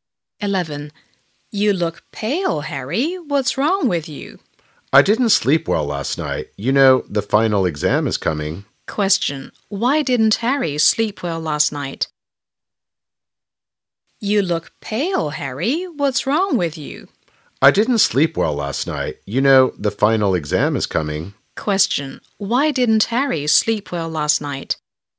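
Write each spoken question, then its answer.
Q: Why didn't Harry sleep well last night?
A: Because the final exam is coming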